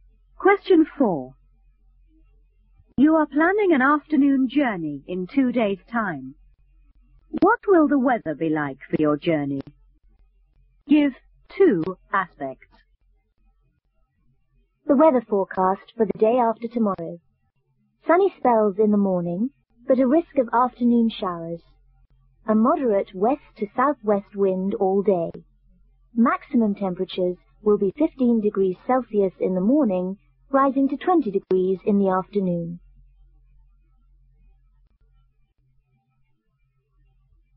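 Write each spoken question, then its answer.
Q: What will the weather be like for your journey?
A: Risk of showers, moderate west to southwest wind, 20 degrees Celsius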